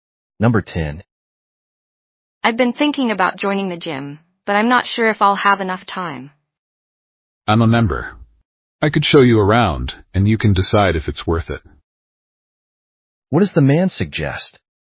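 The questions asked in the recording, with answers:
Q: What does the man suggest?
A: He could show her around the gym so she can decide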